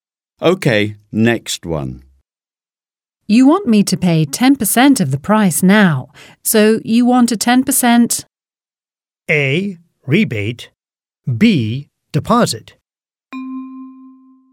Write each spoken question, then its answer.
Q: You want me to pay 10% of the price now, so you want a 10%?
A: B is correct. Deposit.